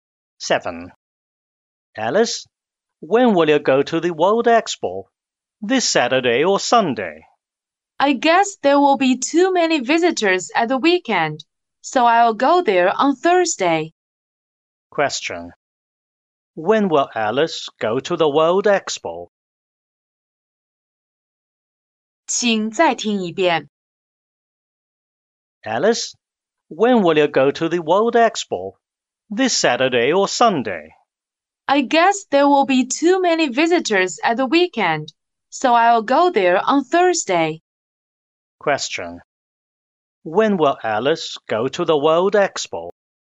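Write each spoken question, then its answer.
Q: When will Alice go to the World Expo?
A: On Thursday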